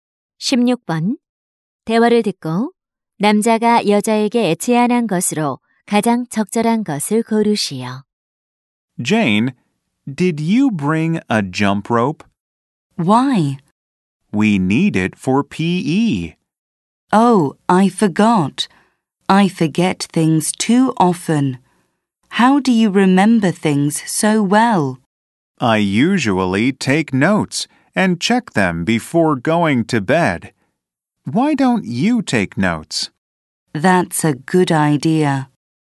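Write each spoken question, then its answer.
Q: 대화를 듣고 남자가 여자에게 제안한 것으로 가장 적절한 것을 고르시오.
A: 메모하기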